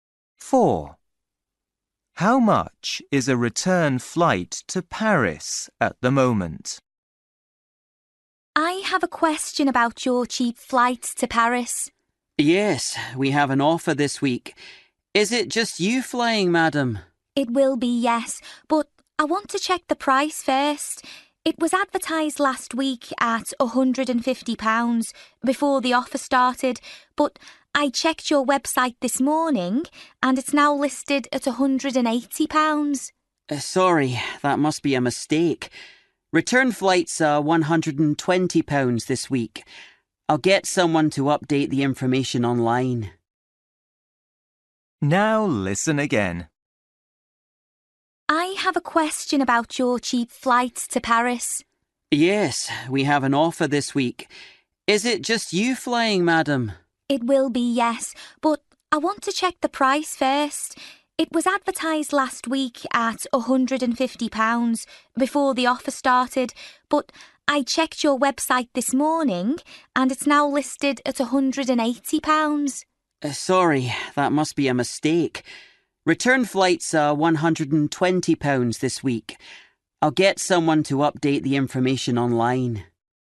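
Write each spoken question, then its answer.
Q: How much is a return flight to Paris at the moment?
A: £120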